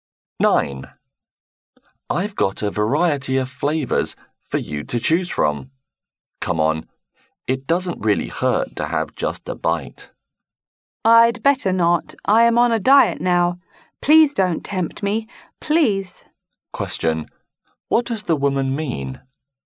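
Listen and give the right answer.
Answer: She won't eat any because she is on a diet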